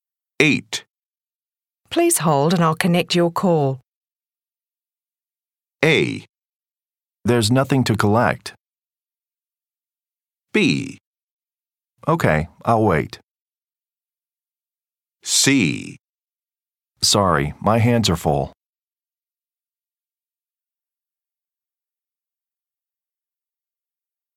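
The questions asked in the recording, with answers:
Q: Please hold and I'll connect your call.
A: B: Okay, I'll wait.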